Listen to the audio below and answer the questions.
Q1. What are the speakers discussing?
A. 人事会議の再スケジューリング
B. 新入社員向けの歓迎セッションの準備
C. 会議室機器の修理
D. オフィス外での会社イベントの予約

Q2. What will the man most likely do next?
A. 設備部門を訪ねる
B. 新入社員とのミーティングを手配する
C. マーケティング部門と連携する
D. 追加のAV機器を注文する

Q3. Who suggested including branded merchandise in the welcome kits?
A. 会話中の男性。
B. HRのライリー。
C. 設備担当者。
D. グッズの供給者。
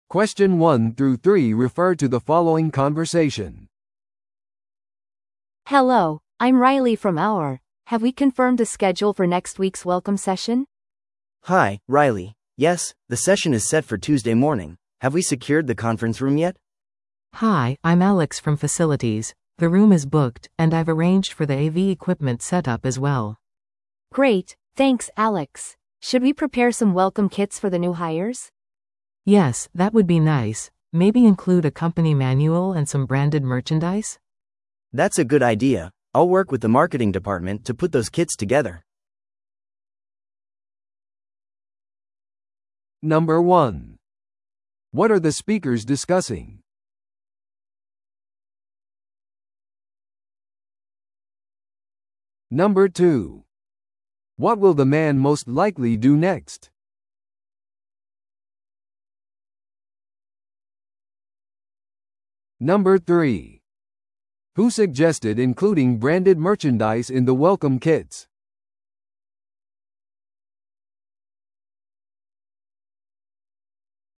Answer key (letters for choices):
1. B
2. C
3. C

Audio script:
A: Hello, I'm Riley from HR. Have we confirmed the schedule for next week's welcome session?
B: Hi, Riley. Yes, the session is set for Tuesday morning. Have we secured the conference room yet?
C: Hi, I'm Alex from facilities. The room is booked, and I've arranged for the AV equipment setup as well.
A: Great, thanks Alex. Should we prepare some welcome kits for the new hires?
C: Yes, that would be nice. Maybe include a company manual and some branded merchandise?
B: That's a good idea. I'll work with the marketing department to put those kits together.